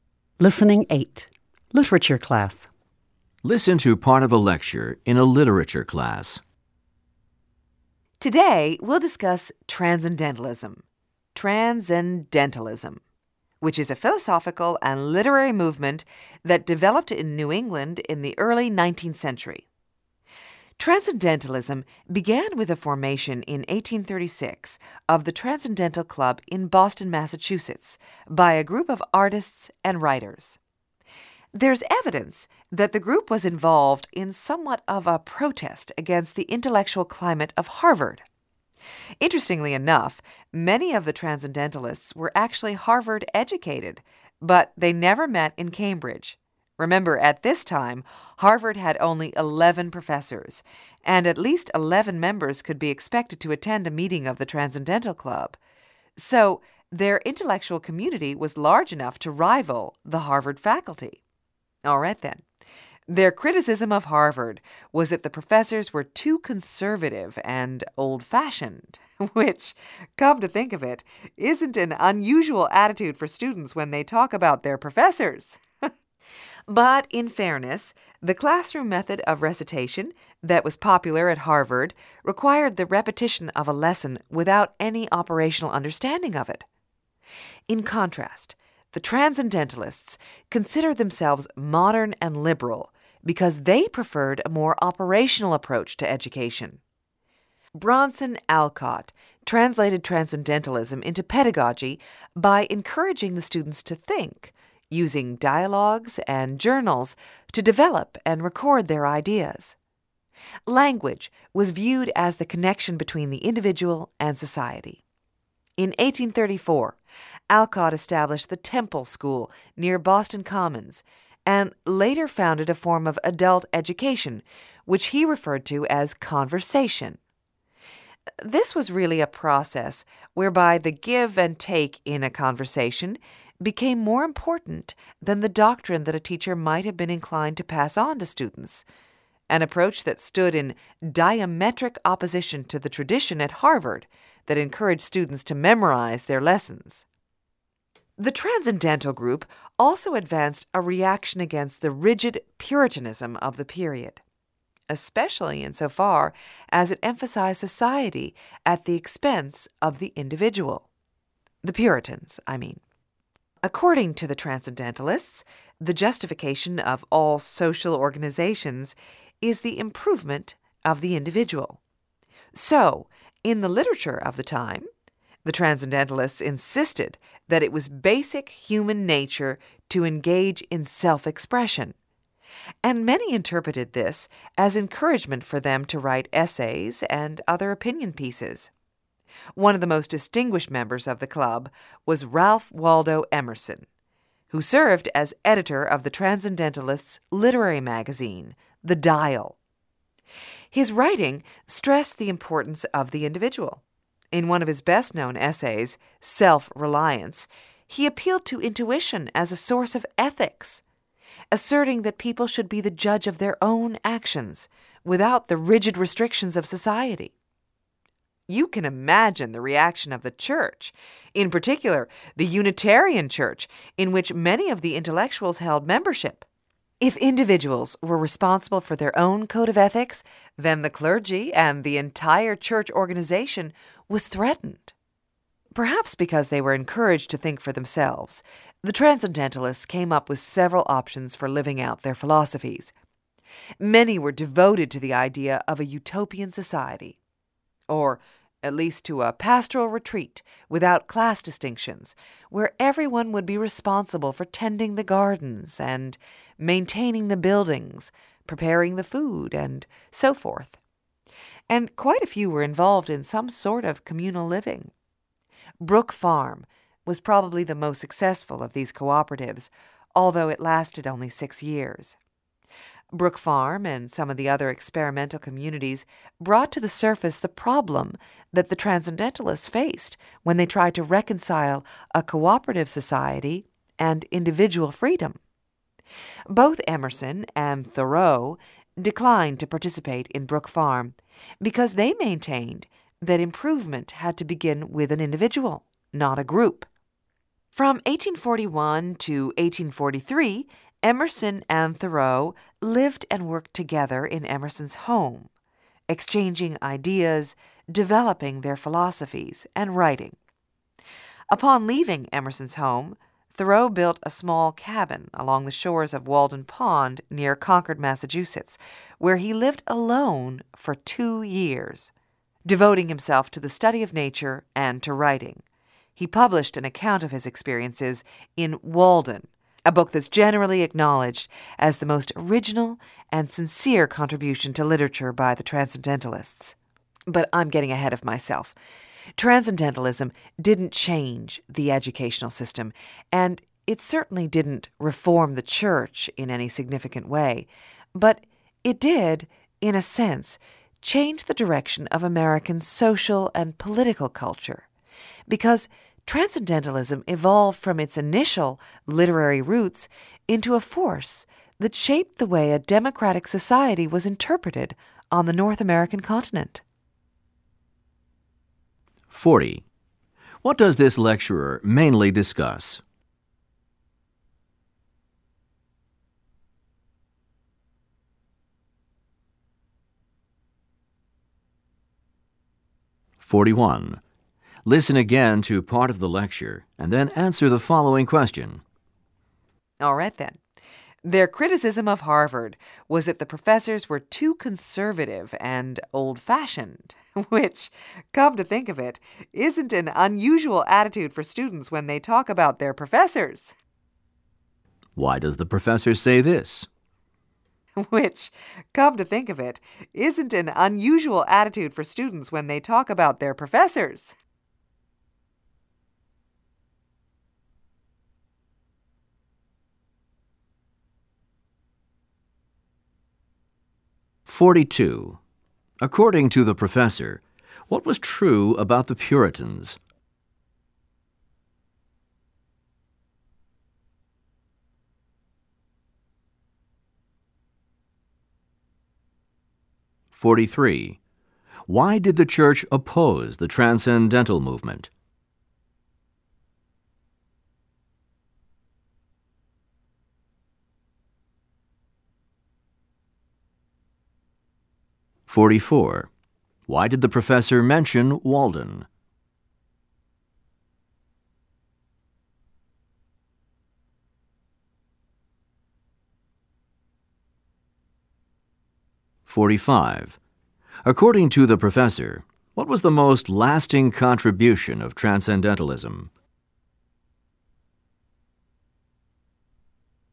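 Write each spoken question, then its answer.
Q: What does this lecturer mainly discuss?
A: Transcendentalism

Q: According to the professor, what was true about the Puritans?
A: They emphasized society at the expense of the individual

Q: Why did the church oppose the Transcendental movement?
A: Because individuals deciding their own ethics threatened the clergy and church organization

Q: Why did the professor mention Walden?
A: As the most original and sincere contribution to literature by the Transcendentalists

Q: According to the professor, what was the most lasting contribution of Transcendentalism?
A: It shaped how democratic society was interpreted in North America (American social and political culture)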